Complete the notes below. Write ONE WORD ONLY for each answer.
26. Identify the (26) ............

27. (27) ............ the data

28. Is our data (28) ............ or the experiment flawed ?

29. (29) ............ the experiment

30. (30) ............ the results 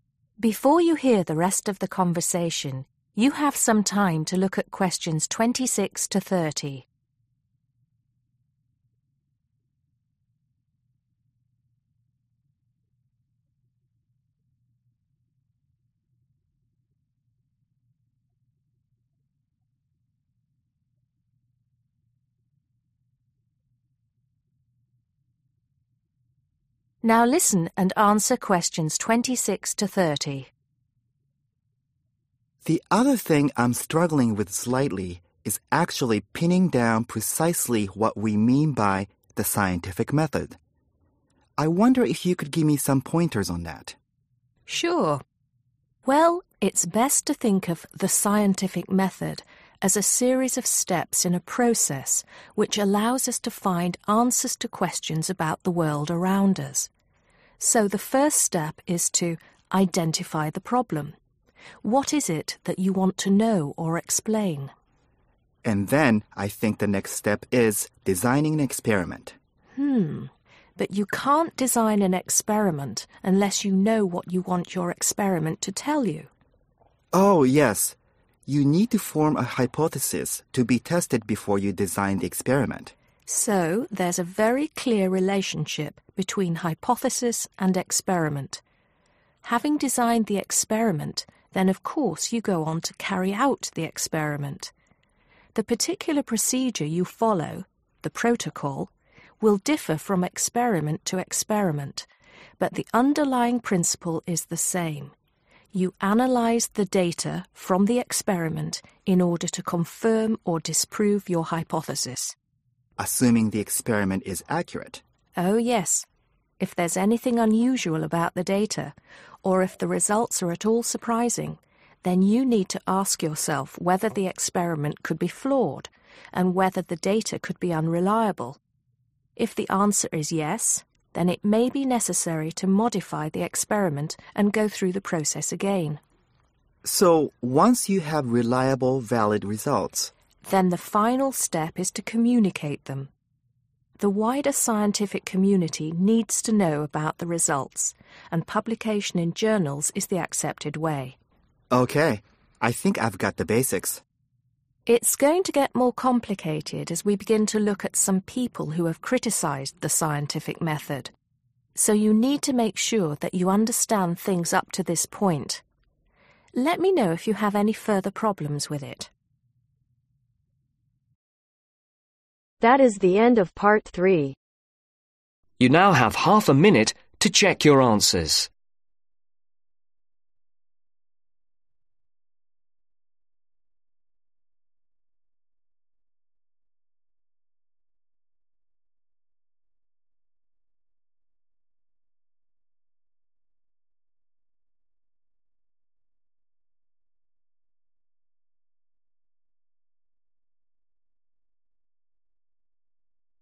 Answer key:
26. problem
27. analyse
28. unreliable/unusual/surprising
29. modify
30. communicate